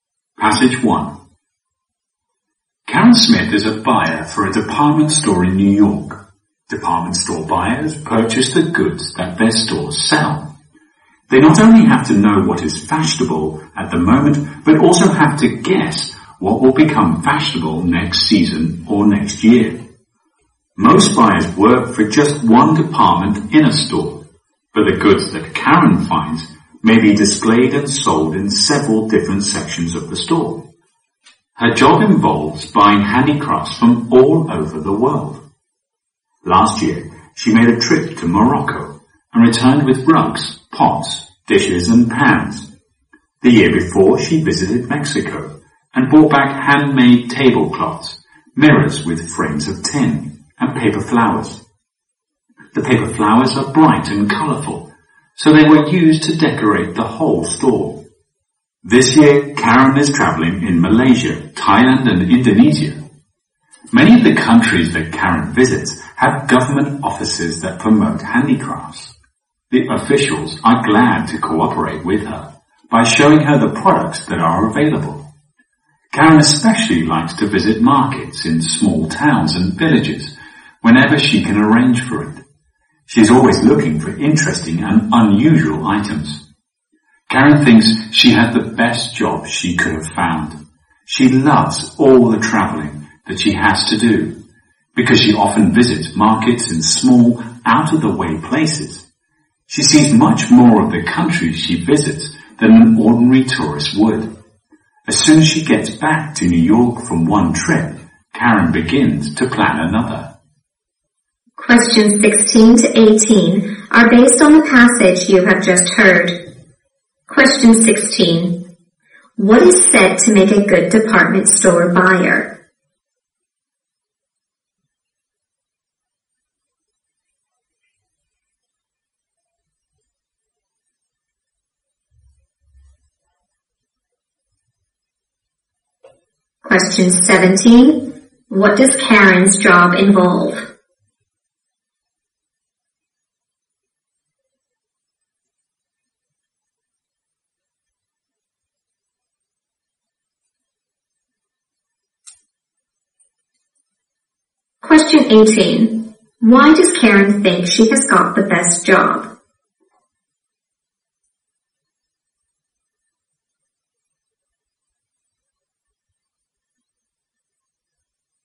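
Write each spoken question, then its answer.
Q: What is said to make a good department store buyer?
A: Knowing what is in fashion now and guessing what will be in fashion next

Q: What does Karen's job involve?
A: Buying handicrafts from all over the world

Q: Why does Karen think she has got the best job?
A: She loves traveling and visiting markets in out-of-the-way places.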